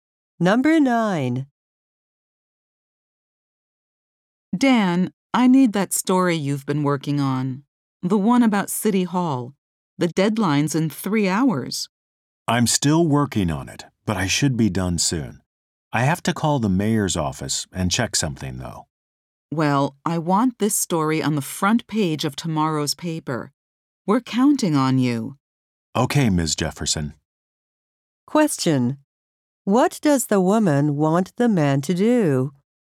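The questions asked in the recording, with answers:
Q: What does the woman want the man to do?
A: Finish his City Hall story before the deadline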